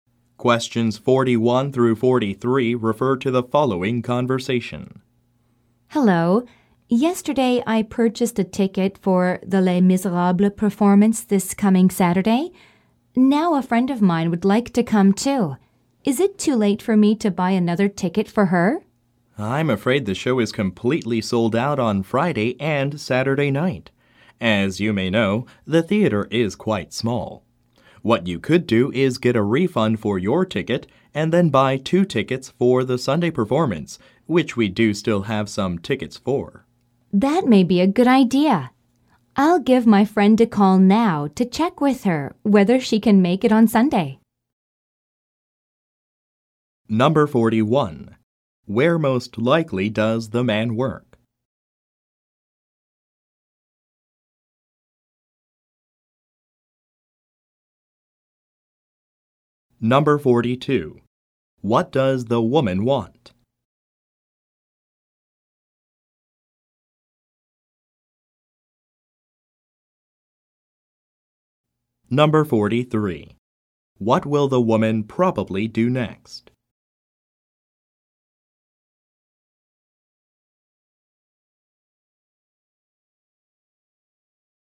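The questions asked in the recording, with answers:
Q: Where most likely does the man work?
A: At a theater box office

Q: What does the woman want?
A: To buy another ticket for her friend

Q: What will the woman probably do next?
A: Call her friend to check if she can go on Sunday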